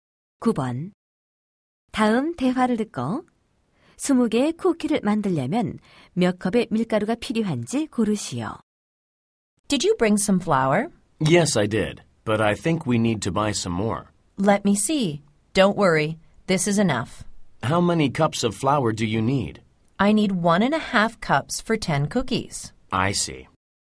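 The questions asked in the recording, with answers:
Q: 다음 대화를 듣고 20개의 쿠키를 만들려면 몇 컵의 밀가루가 필요한지 고르시오.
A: 3컵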